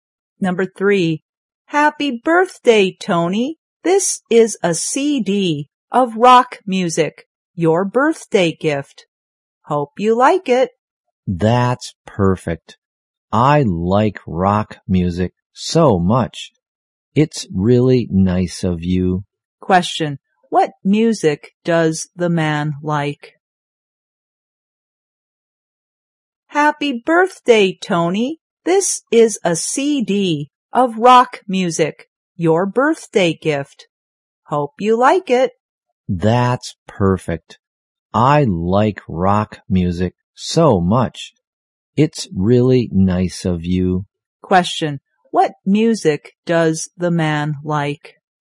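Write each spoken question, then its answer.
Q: What music does the man like?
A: Rock music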